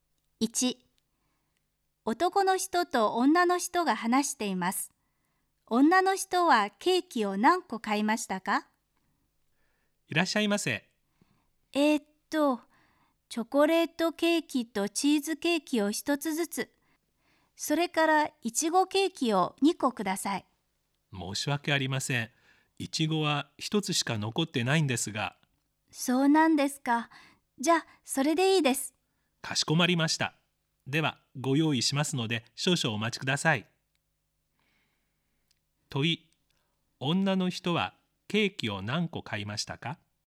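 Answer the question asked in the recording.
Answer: 3個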